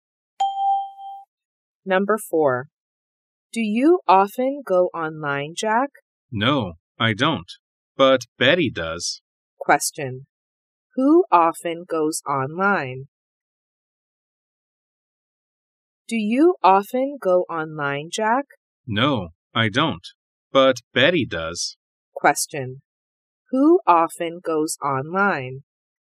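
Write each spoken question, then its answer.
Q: Who often goes online?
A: Betty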